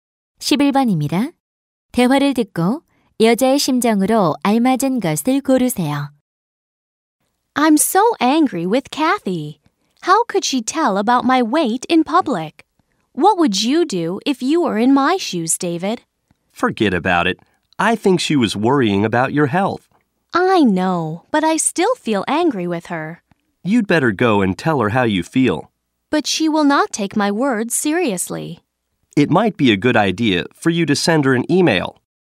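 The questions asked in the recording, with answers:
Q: 대화를 듣고 여자의 심정으로 알맞은 것을 고르세요.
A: 화가 남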